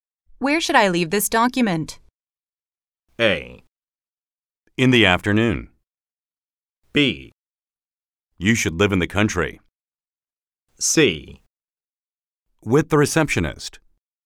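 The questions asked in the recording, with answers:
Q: Where should I leave this document?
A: C: With the receptionist.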